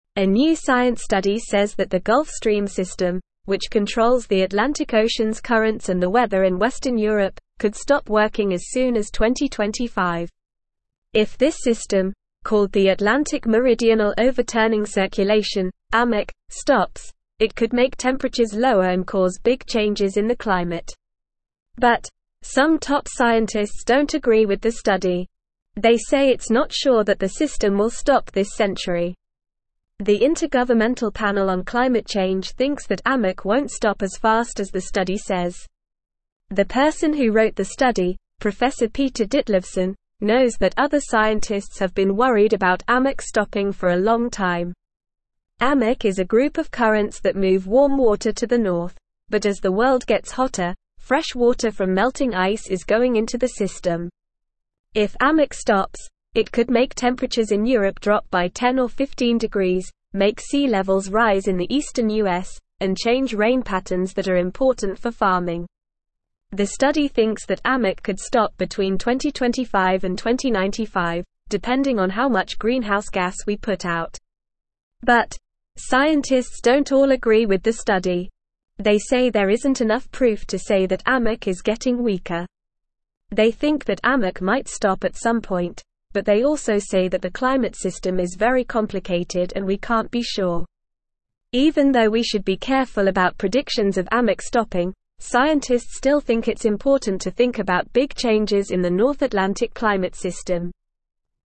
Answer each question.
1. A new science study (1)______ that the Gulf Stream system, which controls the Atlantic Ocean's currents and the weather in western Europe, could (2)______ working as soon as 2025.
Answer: says

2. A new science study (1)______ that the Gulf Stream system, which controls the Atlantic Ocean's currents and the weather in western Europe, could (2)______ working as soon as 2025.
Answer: stop

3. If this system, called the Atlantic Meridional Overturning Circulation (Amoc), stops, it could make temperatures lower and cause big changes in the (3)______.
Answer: climate

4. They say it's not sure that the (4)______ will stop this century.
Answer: system

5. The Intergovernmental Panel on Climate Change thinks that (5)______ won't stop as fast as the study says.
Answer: Amoc

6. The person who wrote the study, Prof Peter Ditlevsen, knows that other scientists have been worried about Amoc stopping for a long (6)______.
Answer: time

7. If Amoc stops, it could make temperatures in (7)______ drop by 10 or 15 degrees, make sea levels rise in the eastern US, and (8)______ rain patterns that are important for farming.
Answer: Europe

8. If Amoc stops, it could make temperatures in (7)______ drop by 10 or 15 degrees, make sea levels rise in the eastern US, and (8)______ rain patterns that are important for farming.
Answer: change

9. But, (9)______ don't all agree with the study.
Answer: scientists

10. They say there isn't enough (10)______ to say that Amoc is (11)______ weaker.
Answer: proof

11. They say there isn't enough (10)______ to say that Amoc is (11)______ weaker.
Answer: getting

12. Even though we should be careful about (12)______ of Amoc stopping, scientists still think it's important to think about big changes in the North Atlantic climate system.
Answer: predictions

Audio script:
A new science study says that the Gulf Stream system, which controls the Atlantic Ocean's currents and the weather in western Europe, could stop working as soon as 2025. If this system, called the Atlantic Meridional Overturning Circulation (Amoc), stops, it could make temperatures lower and cause big changes in the climate. But, some top scientists don't agree with the study. They say it's not sure that the system will stop this century. The Intergovernmental Panel on Climate Change thinks that Amoc won't stop as fast as the study says.
The person who wrote the study, Prof Peter Ditlevsen, knows that other scientists have been worried about Amoc stopping for a long time. Amoc is a group of currents that move warm water to the north, but as the world gets hotter, fresh water from melting ice is going into the system. If Amoc stops, it could make temperatures in Europe drop by 10 or 15 degrees, make sea levels rise in the eastern US, and change rain patterns that are important for farming. The study thinks that Amoc could stop between 2025 and 2095, depending on how much greenhouse gas we put out.
But, scientists don't all agree with the study. They say there isn't enough proof to say that Amoc is getting weaker. They think that Amoc might stop at some point, but they also say that the climate system is very complicated and we can't be sure. Even though we should be careful about predictions of Amoc stopping, scientists still think it's important to think about big changes in the North Atlantic climate system.

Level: Level 2